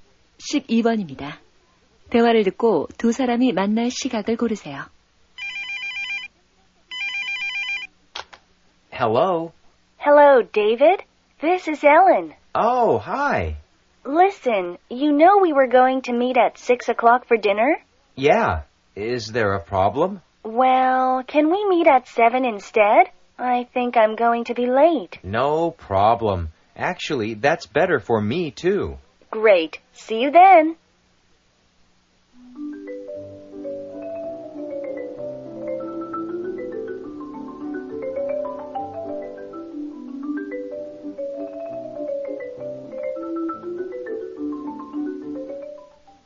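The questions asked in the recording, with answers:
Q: 대화를 듣고 두 사람이 만날 시각을 고르세요.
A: 7시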